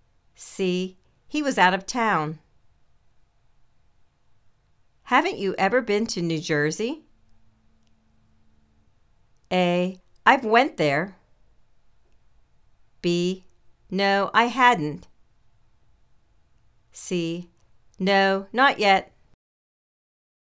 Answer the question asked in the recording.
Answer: No, not yet.